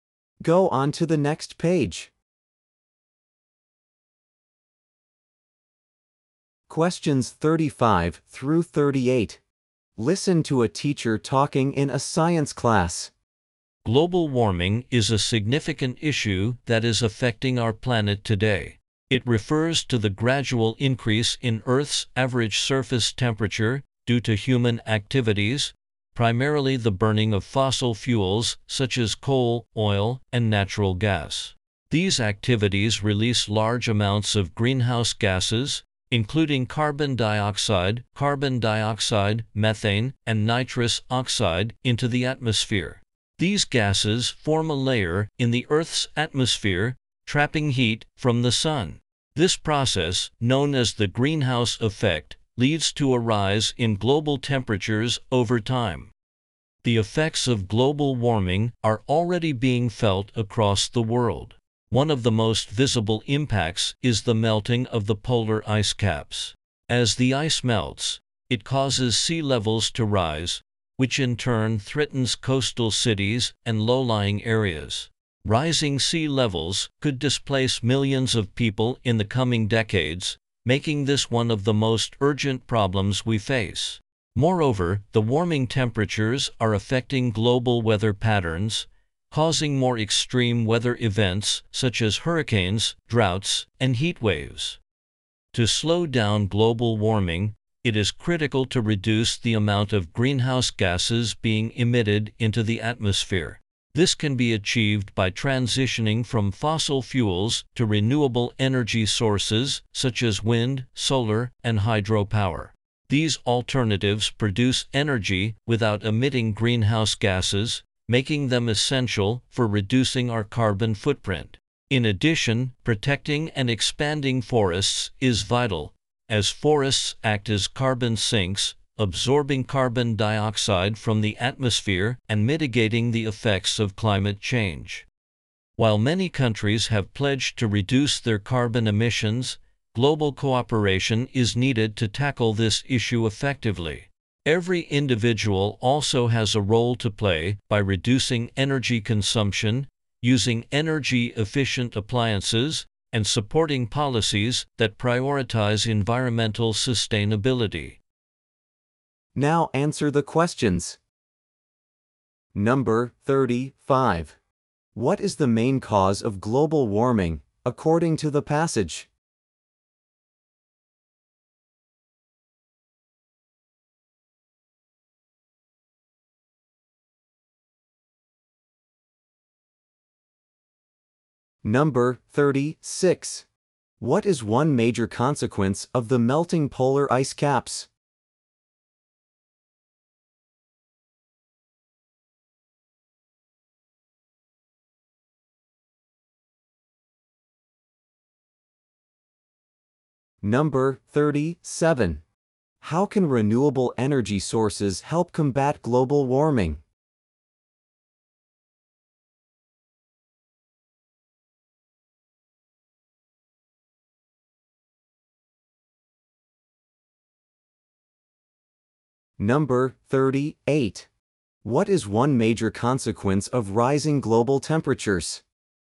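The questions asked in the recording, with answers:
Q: What is the main cause of global warming, according to the passage?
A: Human activities, mainly burning fossil fuels

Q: What is one major consequence of the melting polar ice caps?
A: Rising sea levels

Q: How can renewable energy sources help combat global warming?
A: They produce energy without emitting greenhouse gases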